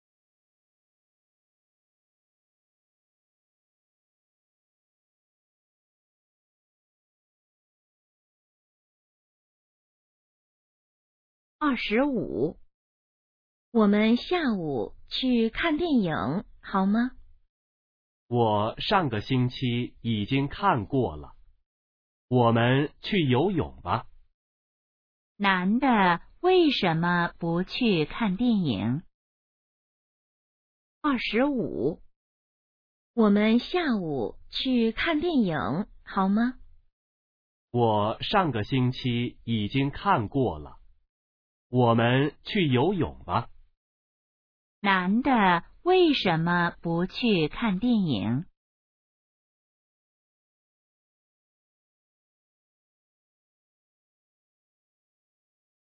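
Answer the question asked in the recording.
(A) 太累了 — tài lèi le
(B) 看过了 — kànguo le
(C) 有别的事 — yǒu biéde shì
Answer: (B) 看过了 — kànguo le

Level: HSK2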